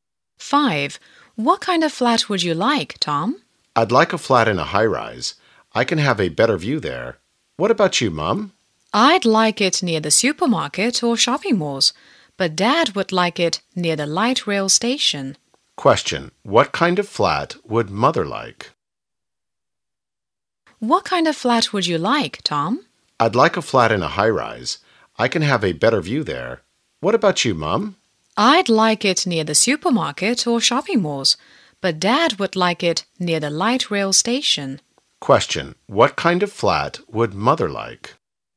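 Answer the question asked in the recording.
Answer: A flat near the supermarket or shopping malls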